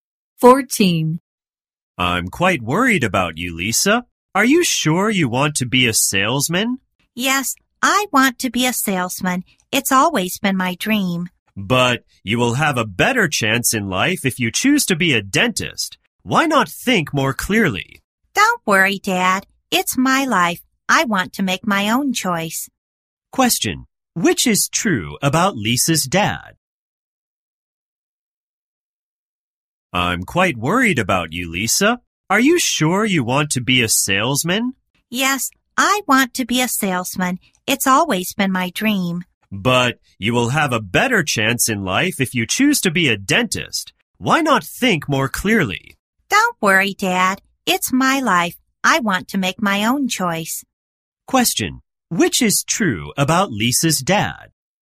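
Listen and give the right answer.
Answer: He wants Lisa to be a dentist, not a salesman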